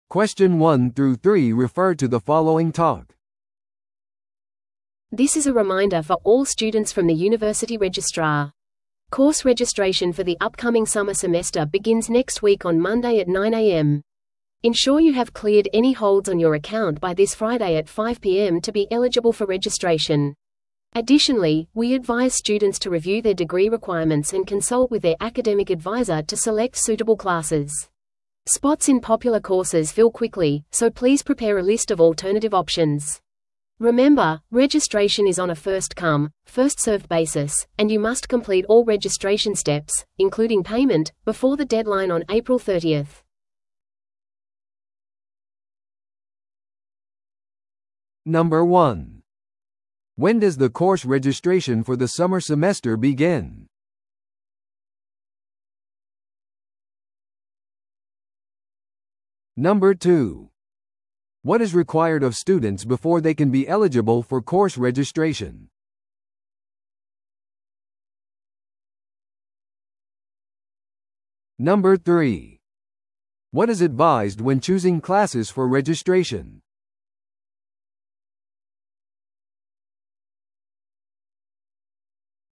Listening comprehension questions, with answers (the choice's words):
Listen to the audio below and answer the questions.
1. When does the course registration for the summer semester begin?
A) この金曜日の午後5時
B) 来週の水曜日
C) 来週の月曜日の午前9時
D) 4月30日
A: 来週の月曜日の午前9時

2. What is required of students before they can be eligible for course registration?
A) 授業料の支払い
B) アカデミックアドバイザーとの相談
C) 金曜日の午後5時までにアカウントの保留を解除すること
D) 代替の授業を選ぶこと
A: 金曜日の午後5時までにアカウントの保留を解除すること

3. What is advised when choosing classes for registration?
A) 大学登録事務所との面談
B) アカデミックアドバイザーと相談すること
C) 人気の授業が埋まるまで待つこと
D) 希望の授業のみを選ぶこと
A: アカデミックアドバイザーと相談すること

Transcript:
This is a reminder for all students from the university registrar. Course registration for the upcoming summer semester begins next week on Monday at 9am. Ensure you have cleared any holds on your account by this Friday at 5pm to be eligible for registration. Additionally, we advise students to review their degree requirements and consult with their academic advisor to select suitable classes. Spots in popular courses fill quickly, so please prepare a list of alternative options. Remember, registration is on a first-come, first-served basis, and you must complete all registration steps, including payment, before the deadline on April 30th.